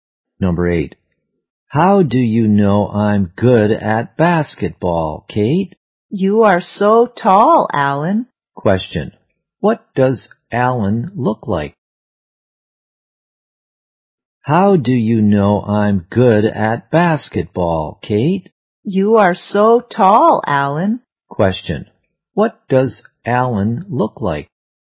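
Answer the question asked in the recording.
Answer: He is tall.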